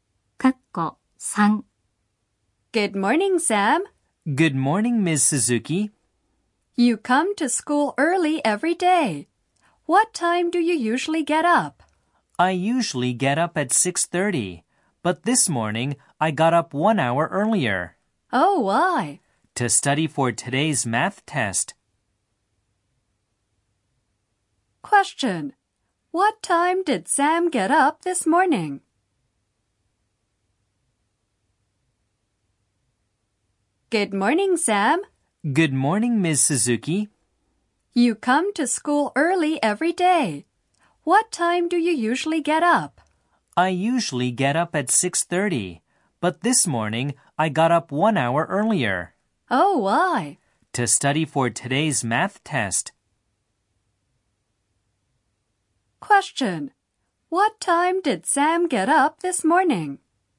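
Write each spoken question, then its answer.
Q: What time did Sam get up this morning?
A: At 5:30.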